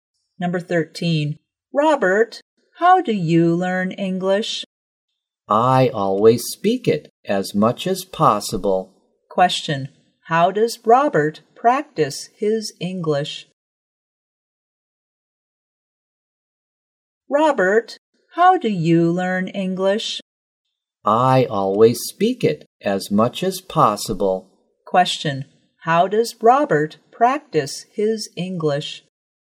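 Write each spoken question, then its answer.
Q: how does Robert practice his English?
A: By speaking it as much as possible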